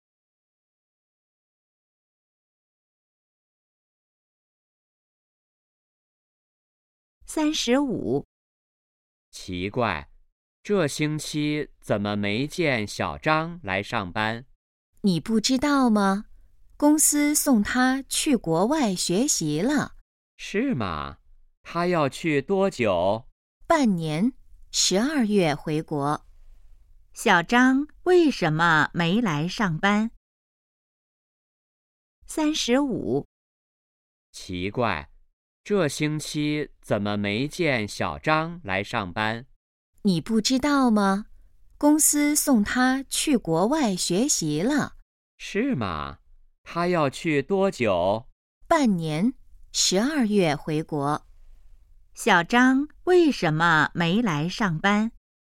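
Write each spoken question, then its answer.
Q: 小张为什么没来上班?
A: 公司送他去国外学习了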